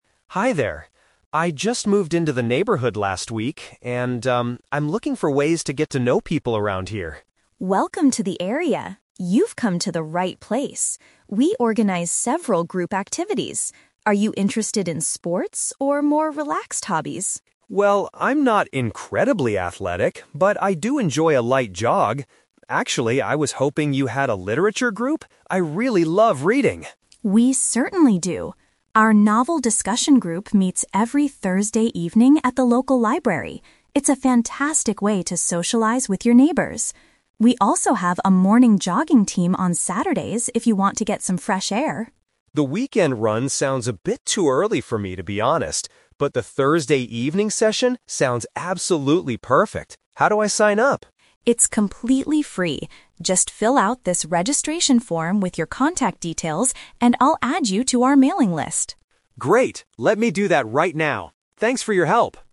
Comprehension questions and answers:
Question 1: Why did Mark visit the community center?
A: To find opportunities to make new friends.

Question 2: Which activity does Mark decide to join?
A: A weekly book reading club.

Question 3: What does Sarah ask Mark to do in order to register?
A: Provide his personal information on a document.

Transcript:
Mark: Hi there. I just moved into the neighborhood last week, and, um, I'm looking for ways to get to know people around here.
Sarah: Welcome to the area! You've come to the right place. We organize several group activities. Are you interested in sports or more relaxed hobbies?
Mark: Well, I'm not incredibly athletic, but I do enjoy a light jog. Actually, I was hoping you had a literature group? I really love reading.
Sarah: We certainly do. Our novel discussion group meets every Thursday evening at the local library. It's a fantastic way to socialize with your neighbors. We also have a morning jogging team on Saturdays if you want to get some fresh air.
Mark: The weekend run sounds a bit too early for me, to be honest. But the Thursday evening session sounds absolutely perfect. How do I sign up?
Sarah: It's completely free. Just fill out this registration form with your contact details, and I'll add you to our mailing list.